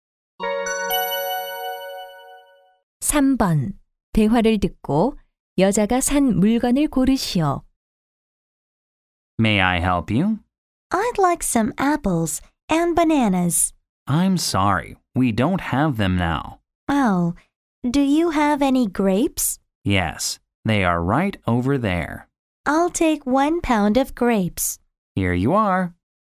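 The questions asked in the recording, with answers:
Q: 대화를 듣고 여자가 산 물건을 고르시오.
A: 포도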